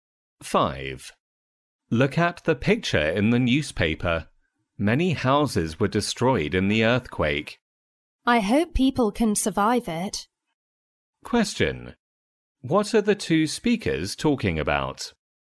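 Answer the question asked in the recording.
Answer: An earthquake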